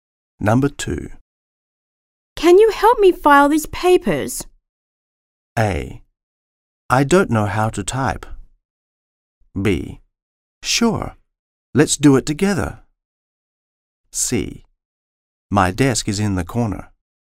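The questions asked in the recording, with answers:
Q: Can you help me file these papers?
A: B: Sure. Let's do it together.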